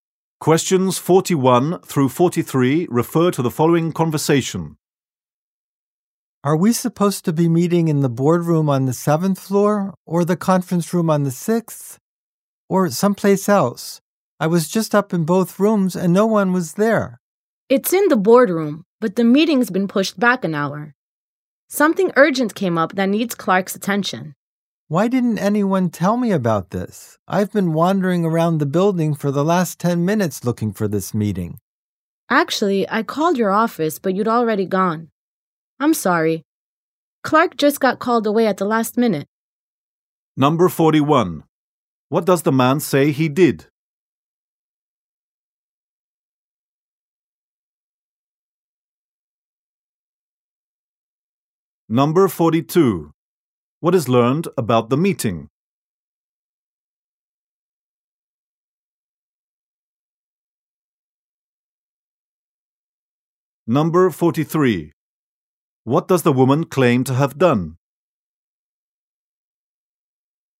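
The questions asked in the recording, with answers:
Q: What does the man say he did?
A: He went to both meeting rooms and found no one there

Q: What is learned about the meeting?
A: It has been pushed back an hour

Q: What does the woman claim to have done?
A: She called the man's office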